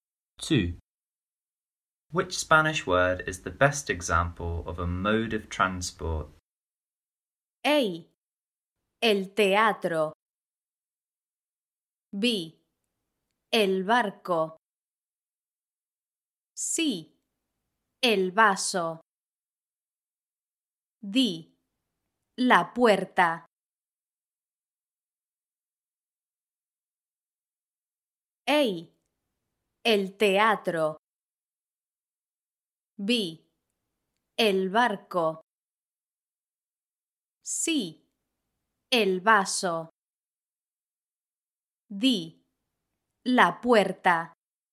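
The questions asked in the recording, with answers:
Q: Which Spanish word is the best example of a mode of transport?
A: B: El barco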